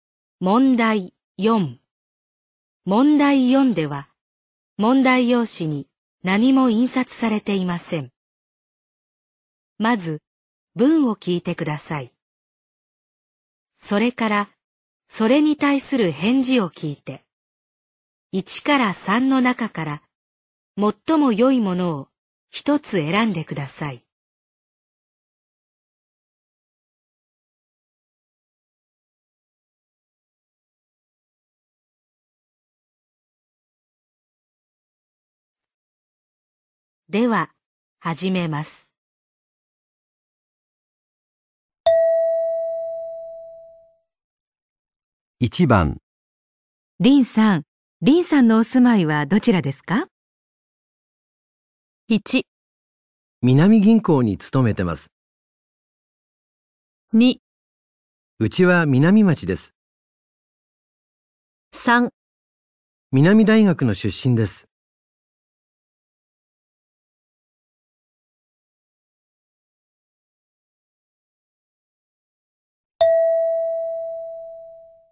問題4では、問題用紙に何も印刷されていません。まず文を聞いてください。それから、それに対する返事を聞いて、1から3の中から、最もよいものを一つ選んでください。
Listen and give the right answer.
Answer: 2

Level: N2 Listening · Test 3